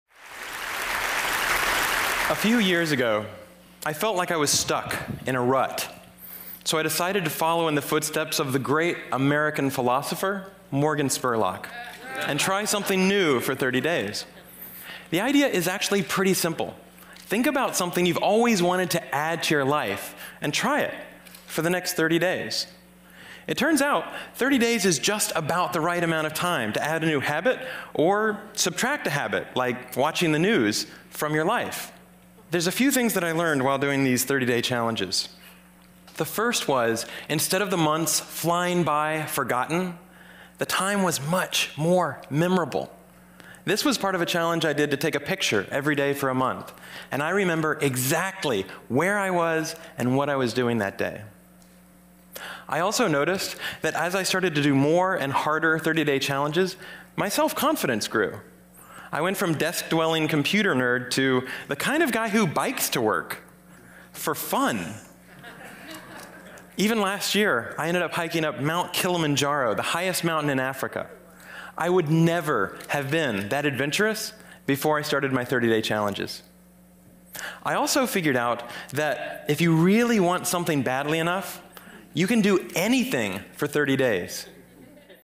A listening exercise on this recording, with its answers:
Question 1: A few years ago, I felt like I was 1__________ __________ __________ __________, so I decided to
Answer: stuck in a rut

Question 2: so I decided to 2__________ __________ __________ __________ __________ the great American philosopher, Morgan Spurlock, and try something new for 30 days.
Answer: follow in the footsteps of

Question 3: The idea is actually 3__________ __________.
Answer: pretty simple

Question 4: Think about something you've always wanted to 4__________ __________ __________ __________ and try it for the next 30 days.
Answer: add to your life

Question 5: 5__________ __________ __________ 30 days is just about the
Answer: It turns out

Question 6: 30 days is just about the 6__________ __________ __________ __________ to add a new habit or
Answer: right amount of time

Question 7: to add a new habit or 7___________________ __________ __________, like watching the news, from your life.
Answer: subtract a habit

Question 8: The first was, instead of the months 8__________ __________, forgotten, the time was much more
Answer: flying by

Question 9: the time was much more 9__________.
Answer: memorable

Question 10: This was part of a challenge I did to take a picture 10__________ __________ __________ __________ ___________________.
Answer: every day for a month

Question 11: my 11__________-__________ __________.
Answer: self-confidence grew

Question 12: I went from 12__________-__________ __________ __________ to the kind of guy who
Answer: desk-dwelling computer nerd

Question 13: to the kind of guy who 13__________ __________ __________. For fun!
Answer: bikes to work

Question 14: Even last year, I ended up 14___________________ __________ __________ __________, the highest mountain in Africa.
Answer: hiking up Mt. Kilimanjaro

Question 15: I would never have been 15__________ __________ before I started my 30-day challenges.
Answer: that adventurous

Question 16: I also 16__________ __________ that if you really want something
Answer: figured out

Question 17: if you really want something 17__________ __________, you can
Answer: badly enough

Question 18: you can 18__________ ___________________ for 30 days.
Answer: do anything

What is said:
A few years ago, I felt like I was stuck in a rut, so I decided to follow in the footsteps of the great American philosopher, Morgan Spurlock, and try something new for 30 days. The idea is actually pretty simple. Think about something you've always wanted to add to your life and try it for the next 30 days. It turns out 30 days is just about the right amount of time to add a new habit or subtract a habit, like watching the news, from your life.
There's a few things I learned while doing these 30-day challenges. The first was, instead of the months flying by, forgotten, the time was much more memorable. This was part of a challenge I did to take a picture every day for a month. And I remember exactly where I was and what I was doing that day. I also noticed that as I started to do more and harder 30-day challenges, my self-confidence grew. I went from desk-dwelling computer nerd to the kind of guy who bikes to work. For fun!